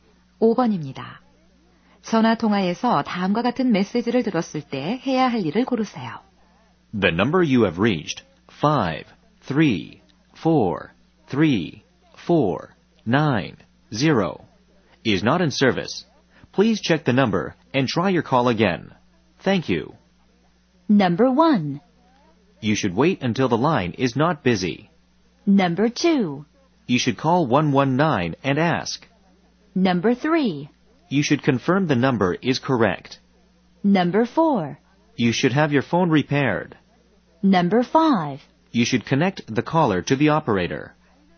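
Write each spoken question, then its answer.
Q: 전화 통화에서 다음과 같은 메시지를 들었을 때 해야 할 일을 고르세요.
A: 3: You should confirm the number is correct.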